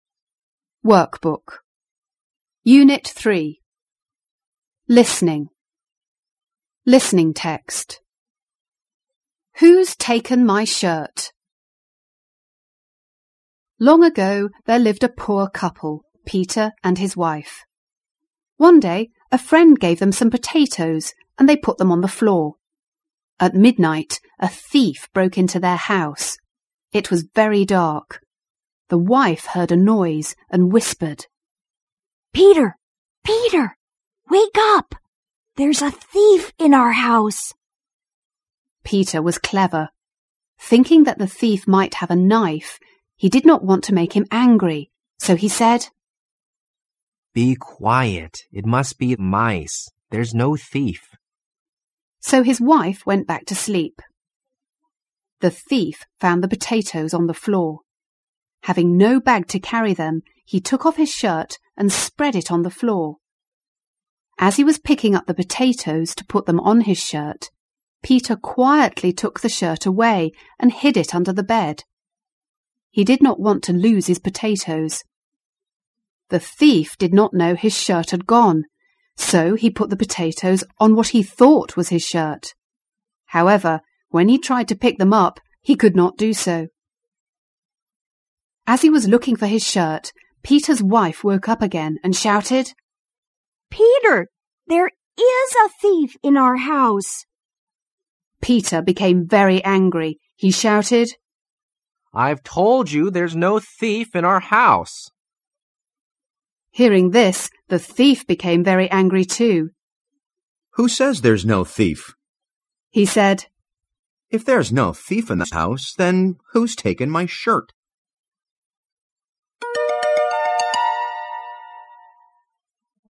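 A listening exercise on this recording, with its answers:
2.Listen to the story again and answer the questions. Then check your answers with your partner.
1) Where did Peter get the potatoes?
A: A friend gave them to him.

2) Why did he ask his wife to be quite when she heard the thief?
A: He thought the thief might have a knife and didn't want to make him angry.

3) Why couldn't the thief take away the potatoes?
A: Peter had taken his shirt away and hidden it under the bed.

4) Why was the thief angry?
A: Peter said there was no thief, but someone had taken his shirt.

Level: 高中英语必修四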